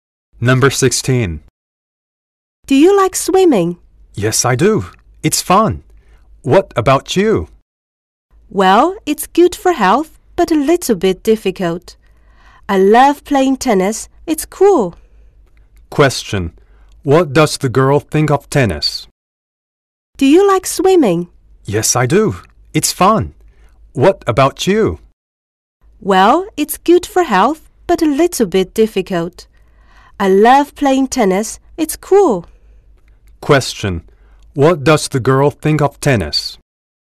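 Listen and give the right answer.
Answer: It's cool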